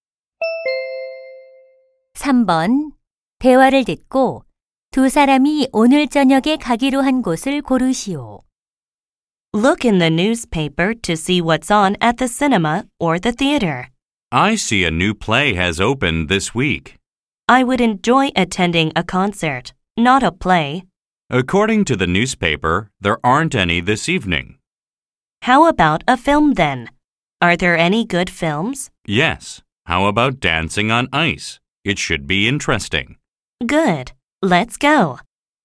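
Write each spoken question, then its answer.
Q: 대화를 듣고 두 사람이 오늘 저녁에 가기로 한 곳을 고르시오.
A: 영화관 (Dancing on Ice 영화 관람)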